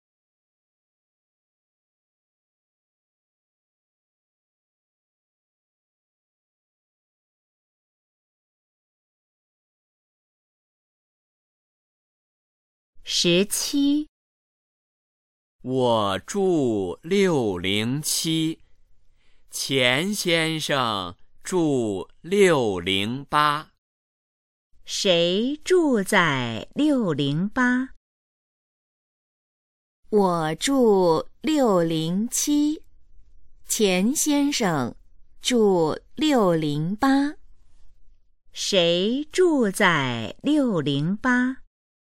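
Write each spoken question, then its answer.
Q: 谁住在608?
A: 钱先生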